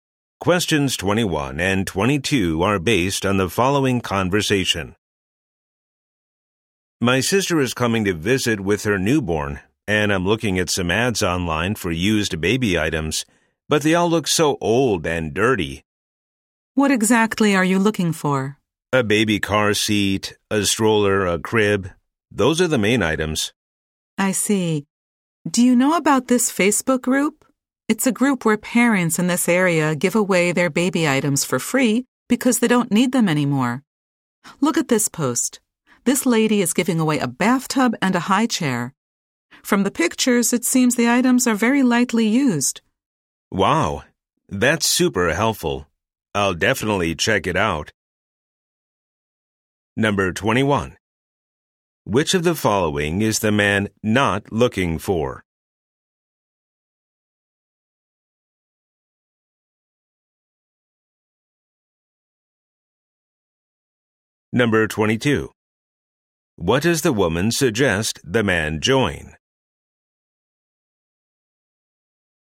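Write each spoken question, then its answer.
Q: What does the woman suggest the man join?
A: A Facebook group where parents give away baby items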